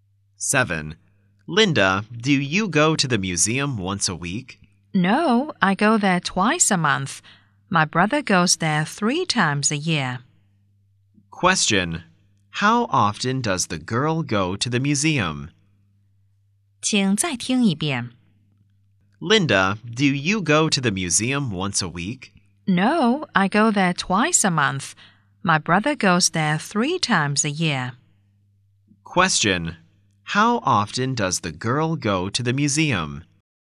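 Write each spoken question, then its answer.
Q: How often does the girl go to the museum?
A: Twice a month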